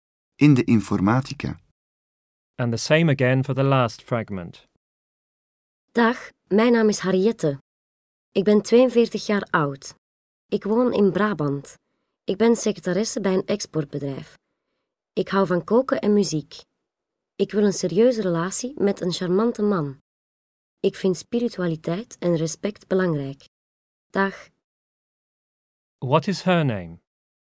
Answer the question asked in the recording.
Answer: Harriette.